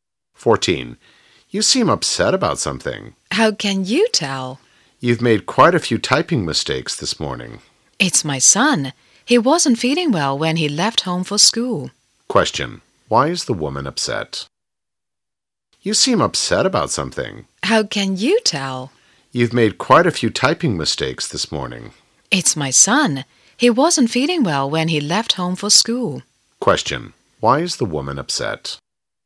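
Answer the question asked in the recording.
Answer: Her son wasn't feeling well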